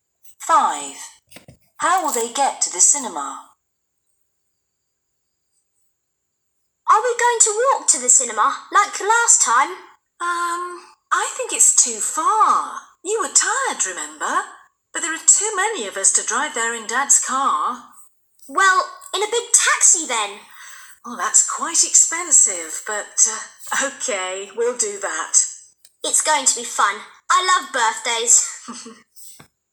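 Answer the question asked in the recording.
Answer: in a big taxi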